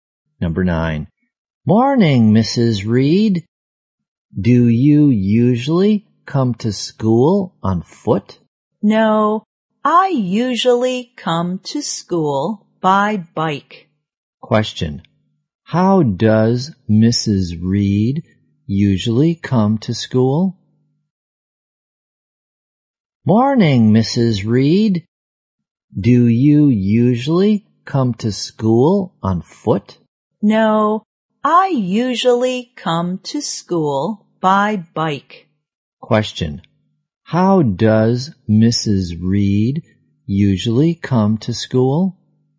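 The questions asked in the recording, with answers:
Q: How does Mrs. Reed usually come to school?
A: By bike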